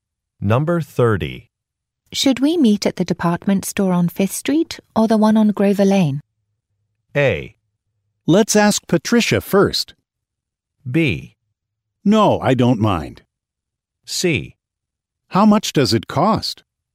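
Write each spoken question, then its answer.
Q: Should we meet at the department store on 5th Street or the one on Grover Lane?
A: A: Let's ask Patricia first.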